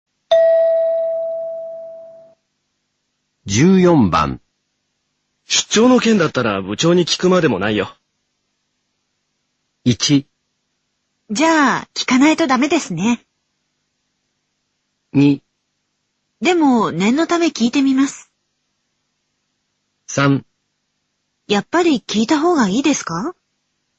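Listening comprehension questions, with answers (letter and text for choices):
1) 出張の件だったら、部長に聞くまでもないよ。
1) じゃ、聞かないとだめですね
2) でも、念のため聞いてみます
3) やっぱり聞いたほうがいいですか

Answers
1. 2) でも、念のため聞いてみます

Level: N1级别听力题库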